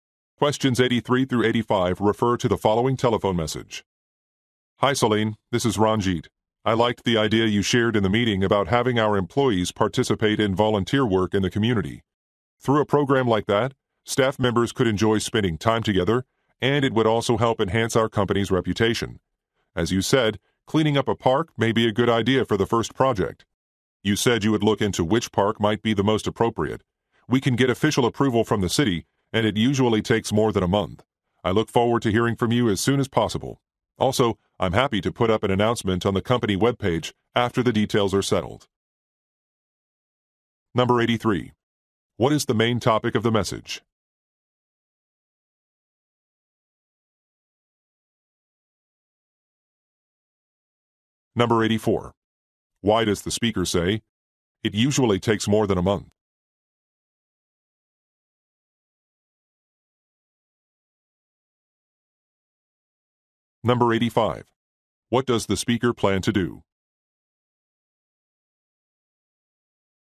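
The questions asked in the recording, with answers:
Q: What is the main topic of the message?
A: A volunteer program for employees

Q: What does the speaker plan to do?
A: Post an announcement on the company webpage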